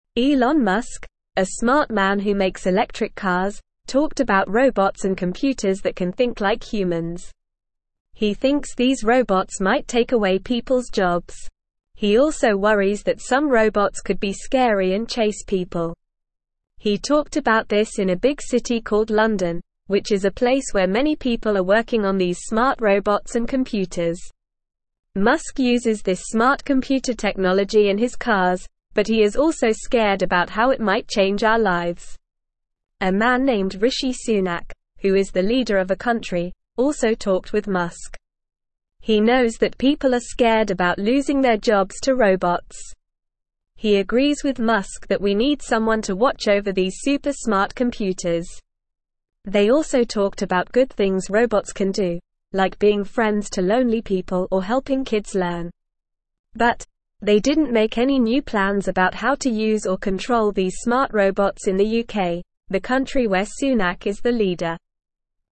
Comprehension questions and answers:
Listen and Fill in the Gaps:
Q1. Elon (1)______, a smart man who makes electric cars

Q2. talked about robots and computers that can think like (2)______.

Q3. which is a place where many people are working on these (3)______ robots and computers.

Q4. Musk uses this smart computer technology in his (4)______, but he is also scared about how it might change our lives.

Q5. He knows that people are (5)______ about losing their jobs to robots.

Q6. He agrees with Musk that we (6)______ someone to watch over these super smart computers.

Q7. They also (7)______ about good things robots can do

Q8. like being friends to lonely people or helping kids (8)______.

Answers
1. Musk
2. humans
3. smart
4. cars
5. scared
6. need
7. talked
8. learn

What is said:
Elon Musk, a smart man who makes electric cars, talked about robots and computers that can think like humans. He thinks these robots might take away people's jobs. He also worries that some robots could be scary and chase people. He talked about this in a big city called London, which is a place where many people are working on these smart robots and computers. Musk uses this smart computer technology in his cars, but he is also scared about how it might change our lives.
A man named Rishi Sunak, who is the leader of a country, also talked with Musk. He knows that people are scared about losing their jobs to robots. He agrees with Musk that we need someone to watch over these super smart computers. They also talked about good things robots can do, like being friends to lonely people or helping kids learn. But, they didn't make any new plans about how to use or control these smart robots in the UK, the country where Sunak is the leader.

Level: Level 1